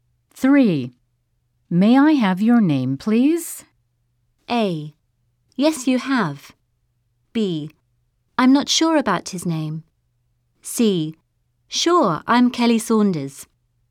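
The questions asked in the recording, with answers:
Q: May I have your name, please?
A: C: Sure, I'm Kelly Saunders.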